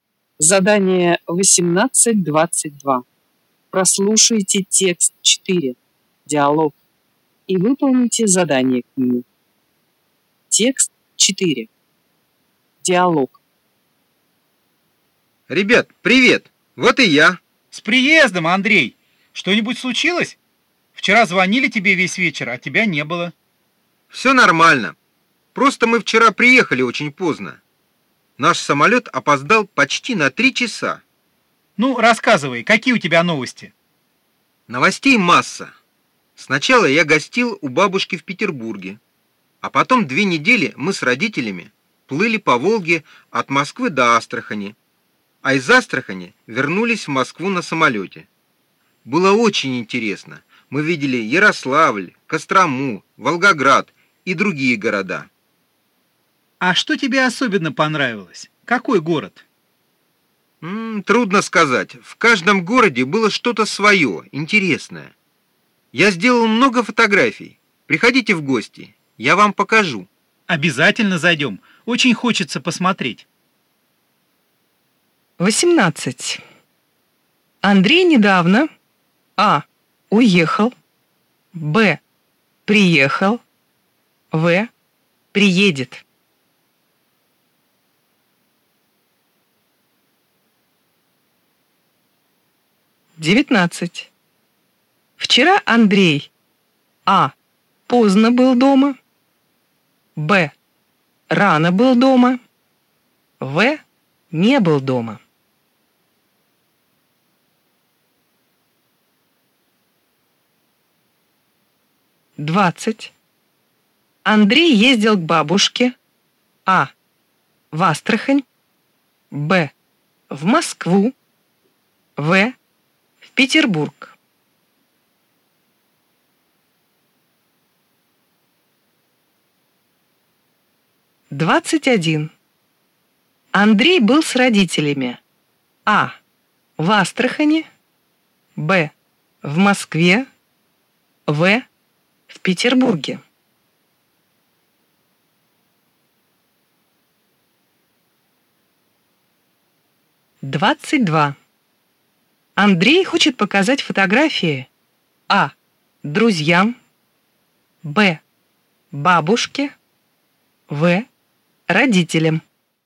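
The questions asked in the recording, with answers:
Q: Андрей недавно А. уехал, Б. приехал, В. приедет.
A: Б: приехал

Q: Андрей ездил к бабушке А. в Астрахань, Б. в Москву, В. Петербург.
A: В: в Петербург

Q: Андрей был с родителями А. в Астрахани, Б. в Москве, В. в Петербурге.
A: А: в Астрахани

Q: Андрей хочет показать фотографии А. друзьям, Б. бабушке, В. родителям.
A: А: друзьям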